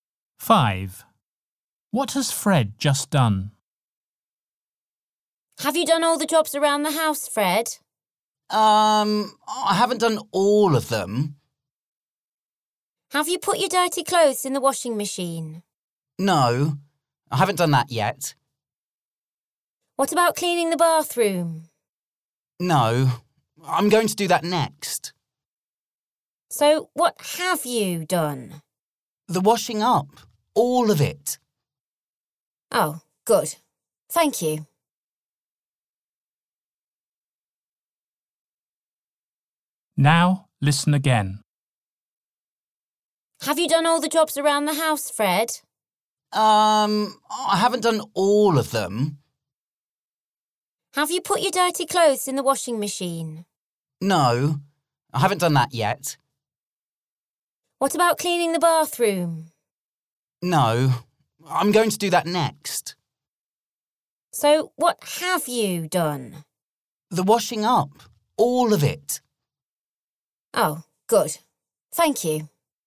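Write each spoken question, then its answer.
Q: What has Fred just done?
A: The washing up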